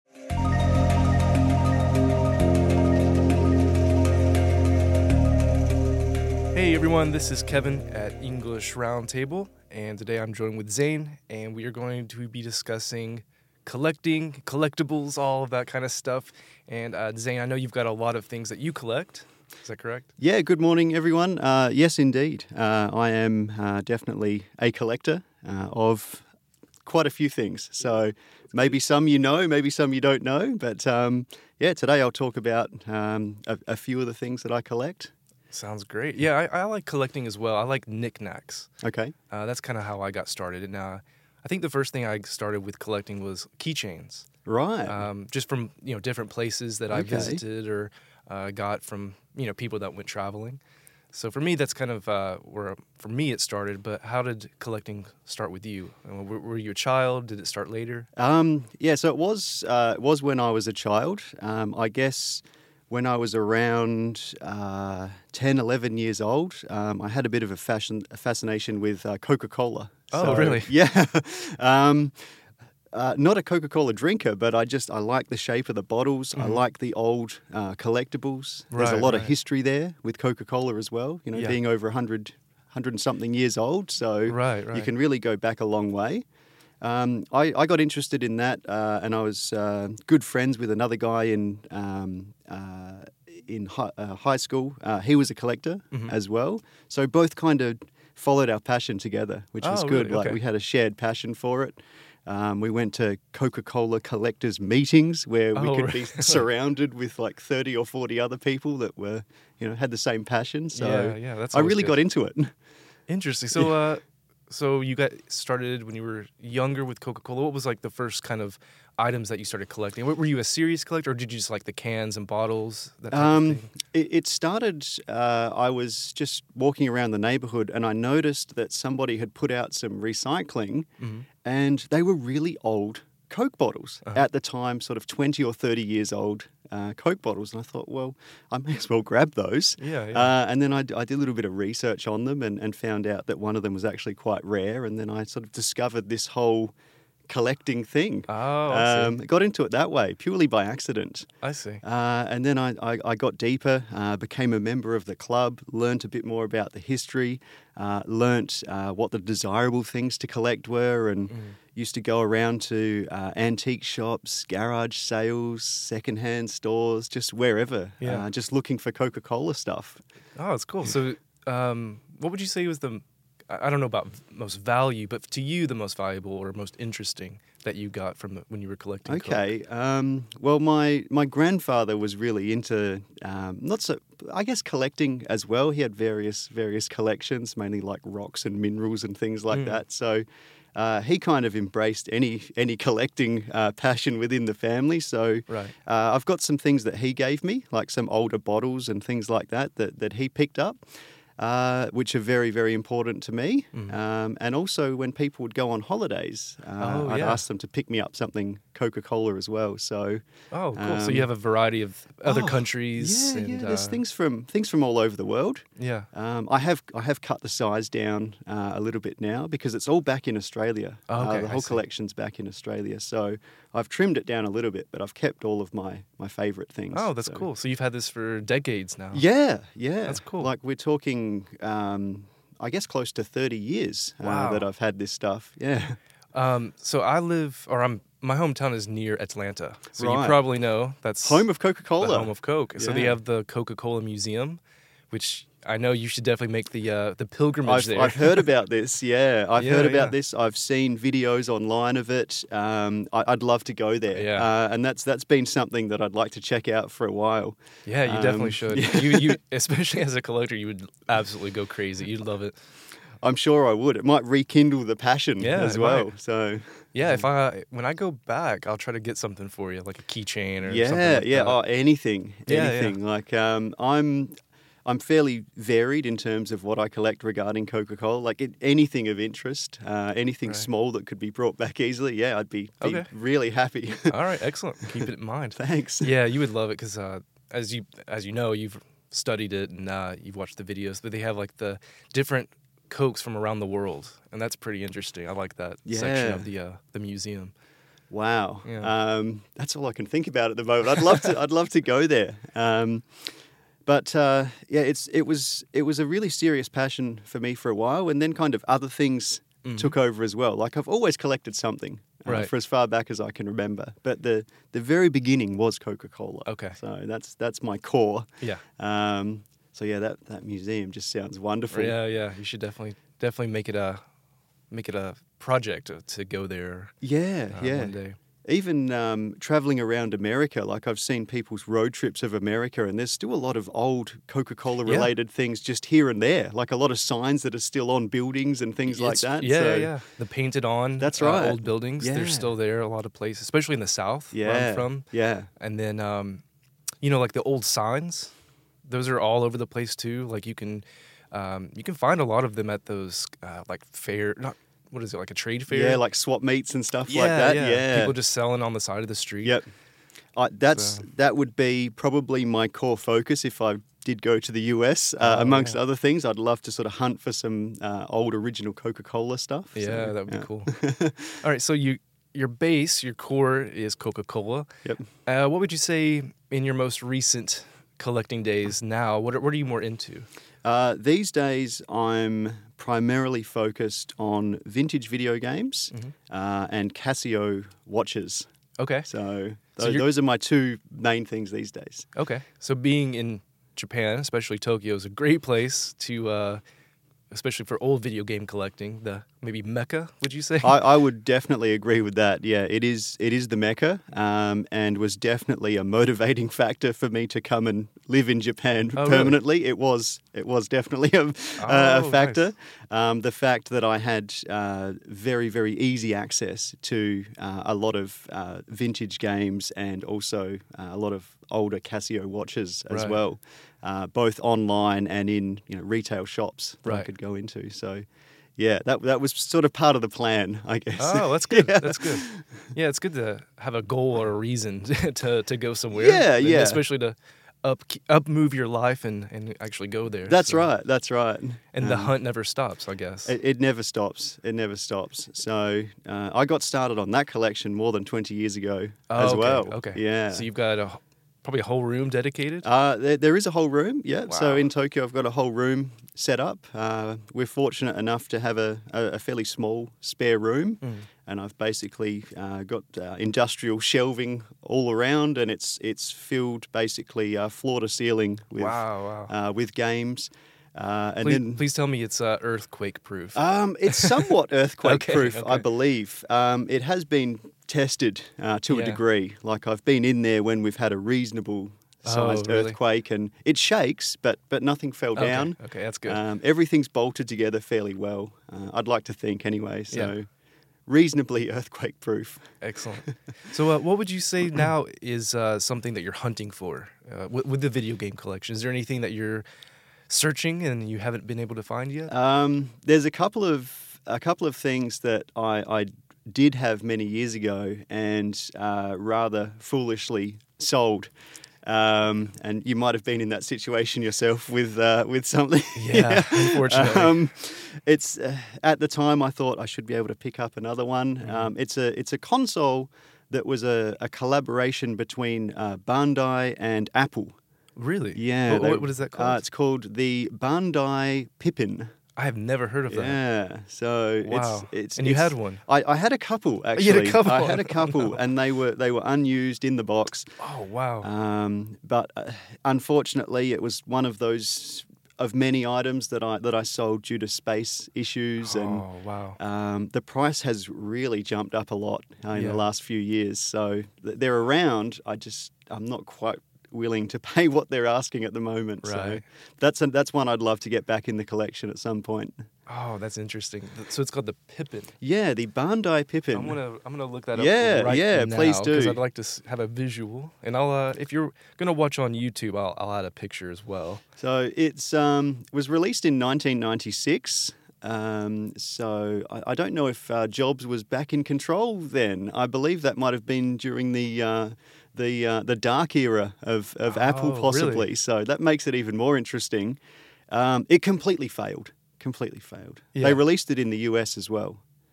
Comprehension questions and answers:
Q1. What did Zane first start collecting?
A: Coca-Cola products